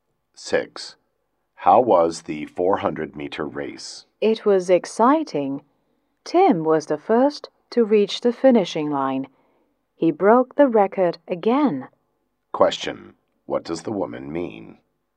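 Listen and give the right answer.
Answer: Tim won the race and broke the record again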